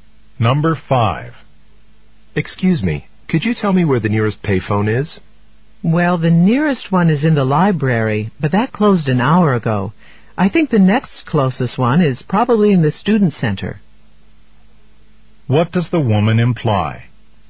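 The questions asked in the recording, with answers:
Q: What does the woman imply?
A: The man should go to the student center to find a payphone.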